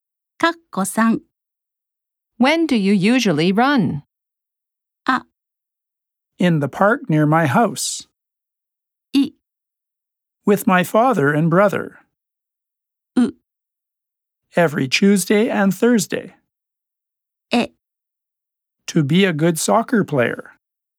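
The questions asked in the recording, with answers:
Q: When do you usually run?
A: う: Every Tuesday and Thursday.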